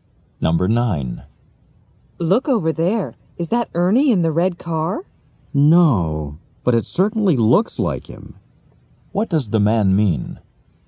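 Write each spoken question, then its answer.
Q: What does the man mean?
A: That isn't Ernie, but he looks like him.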